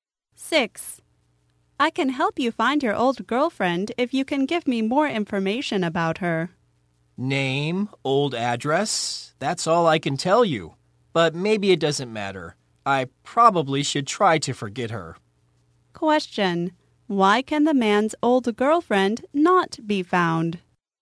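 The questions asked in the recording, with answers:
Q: Why can the man's old girlfriend not be found?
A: He can only give her name and old address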